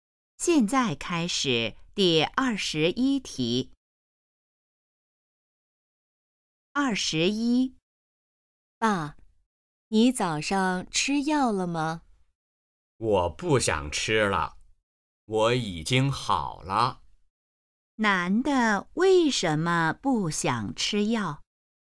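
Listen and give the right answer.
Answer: 他已经好了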